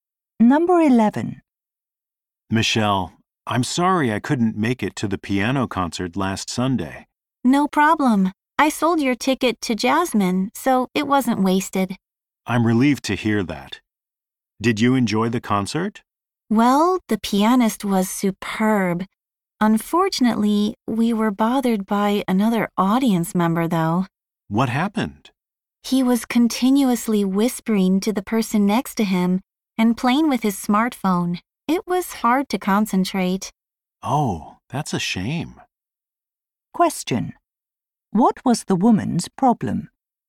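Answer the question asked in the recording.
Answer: Another audience member at the concert kept whispering and using his smartphone.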